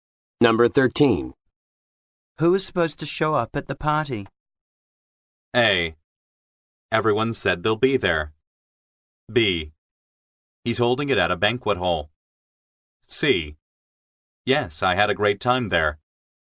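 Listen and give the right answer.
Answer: A: Everyone said they'll be there.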